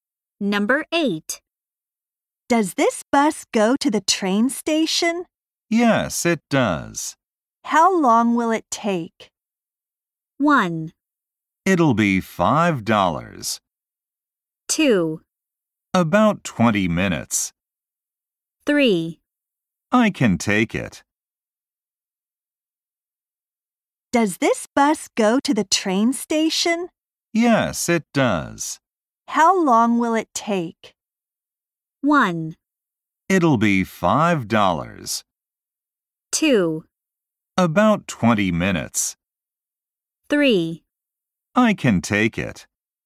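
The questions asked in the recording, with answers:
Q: How long will it take?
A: 2: About 20 minutes.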